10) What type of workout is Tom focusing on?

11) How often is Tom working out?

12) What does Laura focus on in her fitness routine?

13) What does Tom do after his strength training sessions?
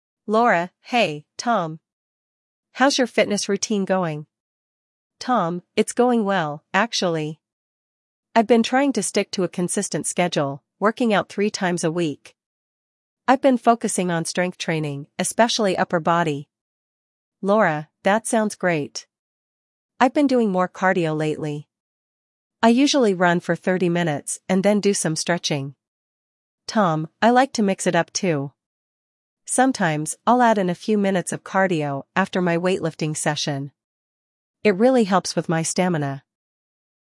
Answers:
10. Strength training.
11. Three times a week.
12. Cardio, including running.
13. He adds cardio after weightlifting.

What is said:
Laura: Hey, Tom! How's your fitness routine going?
Tom: It's going well, actually! I've been trying to stick to a consistent schedule, working out three times a week. I've been focusing on strength training, especially upper body.
Laura: That sounds great. I've been doing more cardio lately. I usually run for 30 minutes and then do some stretching.
Tom: I like to mix it up too. Sometimes, I'll add in a few minutes of cardio after my weightlifting session. It really helps with my stamina.